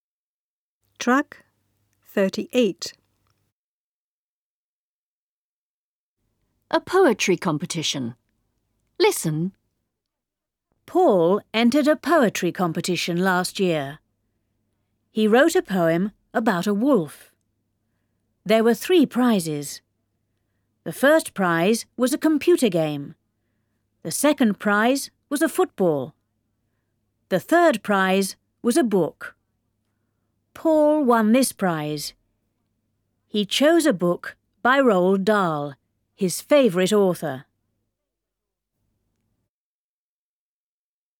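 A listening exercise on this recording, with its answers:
Задание No1. Послушай и скажи верно, или неверно.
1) Paul entered a poetry competition two years ago.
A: False

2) He wrote a poem about winter.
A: False

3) There were three prizes.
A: True

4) The first prize was a computer.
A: False

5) The second prize was a football.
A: True

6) Paul got the second prize.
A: False

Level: учащимся 5-х классов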